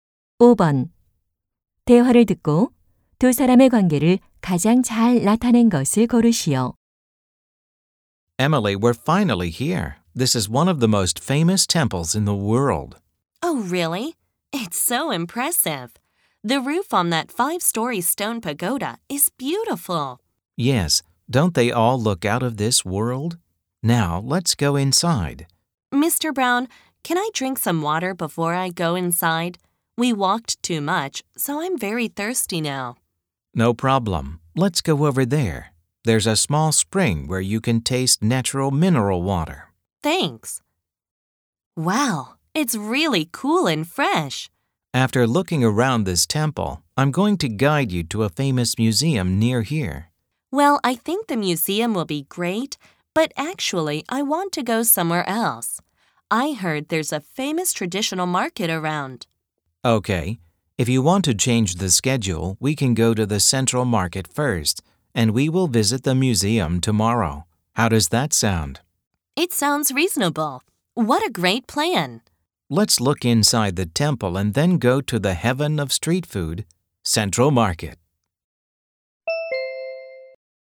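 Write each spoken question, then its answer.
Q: 대화를 듣고 두 사람의 관계를 가장 잘 나타낸 것을 고르시오.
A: 관광 가이드 - 관광객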